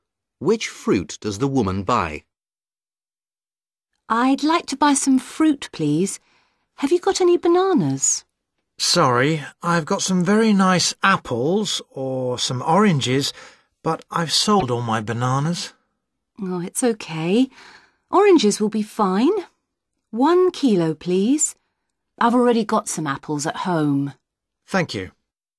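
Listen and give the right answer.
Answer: Oranges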